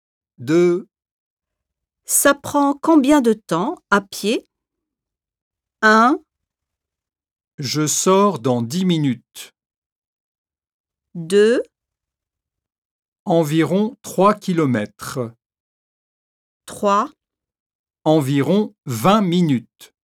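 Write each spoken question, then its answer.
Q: Ça prend combien de temps à pied?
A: 3: Environ 20 minutes.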